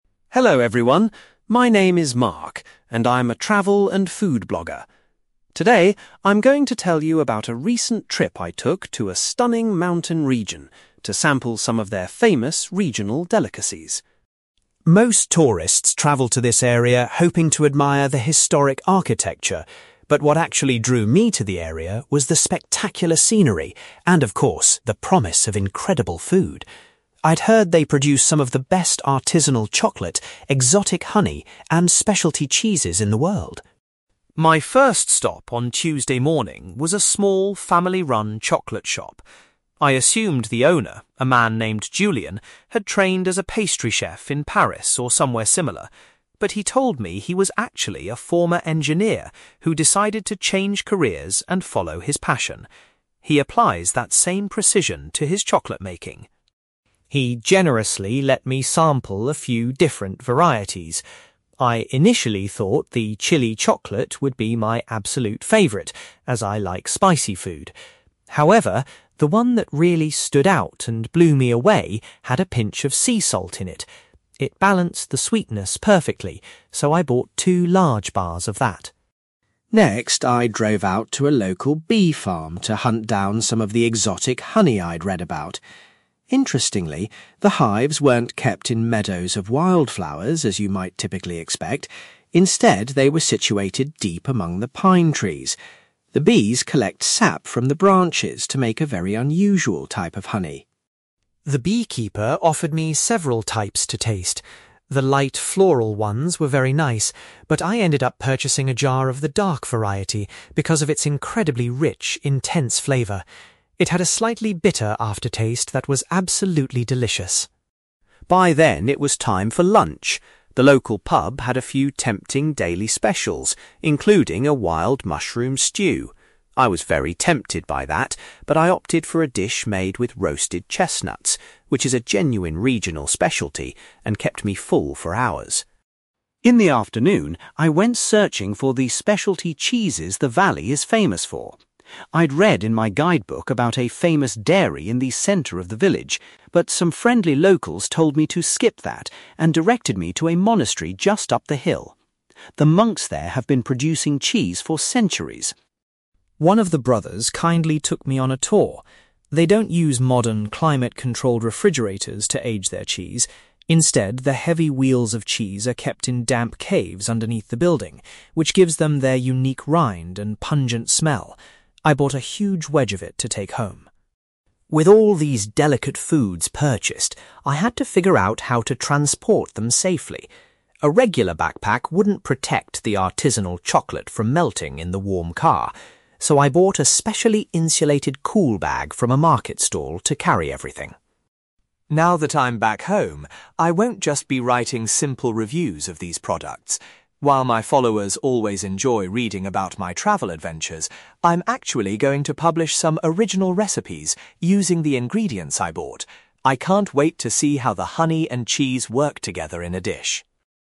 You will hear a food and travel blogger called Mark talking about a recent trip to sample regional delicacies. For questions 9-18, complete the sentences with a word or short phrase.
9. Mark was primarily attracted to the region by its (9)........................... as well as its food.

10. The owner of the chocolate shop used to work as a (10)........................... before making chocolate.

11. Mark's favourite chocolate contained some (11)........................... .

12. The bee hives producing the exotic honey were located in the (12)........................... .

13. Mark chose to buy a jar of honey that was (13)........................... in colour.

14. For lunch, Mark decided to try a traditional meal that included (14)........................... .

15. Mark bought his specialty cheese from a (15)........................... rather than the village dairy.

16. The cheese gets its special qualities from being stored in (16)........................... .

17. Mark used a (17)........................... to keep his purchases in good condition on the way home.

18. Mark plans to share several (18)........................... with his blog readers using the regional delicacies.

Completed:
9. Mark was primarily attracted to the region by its scenery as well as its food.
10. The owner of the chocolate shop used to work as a former engineer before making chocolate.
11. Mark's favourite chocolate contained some sea salt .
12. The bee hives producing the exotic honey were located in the pine trees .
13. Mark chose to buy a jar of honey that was dark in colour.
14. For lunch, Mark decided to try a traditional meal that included roasted chestnuts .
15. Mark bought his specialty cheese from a monastery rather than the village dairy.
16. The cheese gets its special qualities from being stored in caves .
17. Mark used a cool bag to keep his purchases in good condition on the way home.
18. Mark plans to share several recipes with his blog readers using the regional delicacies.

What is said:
Mark: Hello everyone. My name is Mark, and I'm a travel and food blogger. Today, I'm going to tell you about a recent trip I took to a stunning mountain region to sample some of their famous regional delicacies.
Most tourists travel to this area hoping to admire the historic architecture, but what actually drew me to the area was the spectacular scenery, and of course, the promise of incredible food. I'd heard they produce some of the best artisanal chocolate, exotic honey, and specialty cheeses in the world.
My first stop on Tuesday morning was a small, family-run chocolate shop. I assumed the owner, a man named Julian, had trained as a pastry chef in Paris or somewhere similar. But he told me he was actually a former engineer who decided to change careers and follow his passion. He applies that same precision to his chocolate making.
He generously let me sample a few different varieties. I initially thought the chili chocolate would be my absolute favourite, as I like spicy food. However, the one that really stood out and blew me away had a pinch of sea salt in it. It balanced the sweetness perfectly, so I bought two large bars of that.
Next, I drove out to a local bee farm to hunt down some of the exotic honey I'd read about. Interestingly, the hives weren't kept in meadows of wildflowers as you might typically expect; instead, they were situated deep among the pine trees. The bees collect sap from the branches to make a very unusual type of honey.
The beekeeper offered me several types to taste. The light, floral ones were very nice, but I ended up purchasing a jar of the dark variety because of its incredibly rich, intense flavour. It had a slightly bitter aftertaste that was absolutely delicious.
By then, it was time for lunch. The local pub had a few tempting daily specials, including a wild mushroom stew. I was very tempted by that, but I opted for a dish made with roasted chestnuts, which is a genuine regional specialty and kept me full for hours.
In the afternoon, I went searching for the specialty cheeses the valley is famous for. I'd read in my guidebook about a famous dairy in the centre of the village, but some friendly locals told me to skip that and directed me to a monastery just up the hill. The monks there have been producing cheese for centuries.
One of the brothers kindly took me on a tour. They don't use modern, climate-controlled refrigerators to age their cheese. Instead, the heavy wheels of cheese are kept in damp caves underneath the building, which gives them their unique rind and pungent smell. I bought a huge wedge of it to take home.
With all these delicate foods purchased, I had to figure out how to transport them safely. A regular backpack wouldn't protect the artisanal chocolate from melting in the warm car, so I bought a specially insulated cool bag from a market stall to carry everything.
Now that I'm back home, I won't just be writing simple reviews of these products. While my followers always enjoy reading about my travel adventures, I'm actually going to publish some original recipes using the ingredients I bought. I can't wait to see how the honey and cheese work together in a dish!

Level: B2